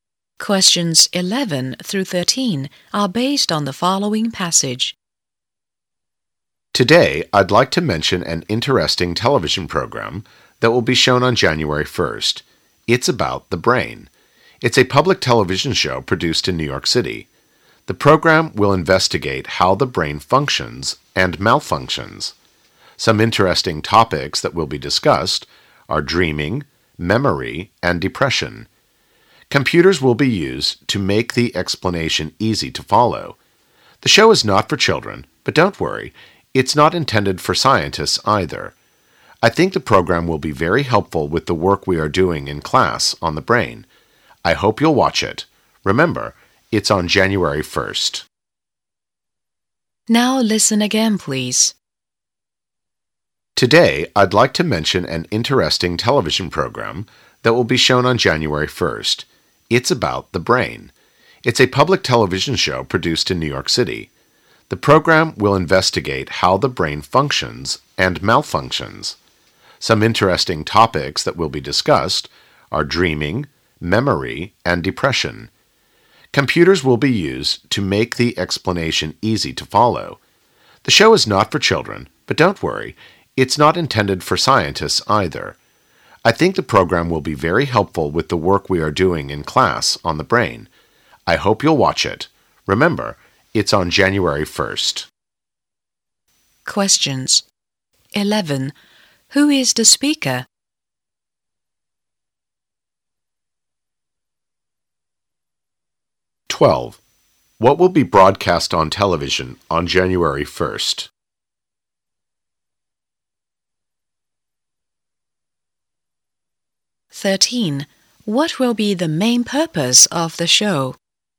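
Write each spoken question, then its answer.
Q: Who is the speaker?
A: A teacher

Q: What will be broadcast on television on January 1st?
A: A program about the brain

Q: What will be the main purpose of the show?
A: To explain how the brain functions and malfunctions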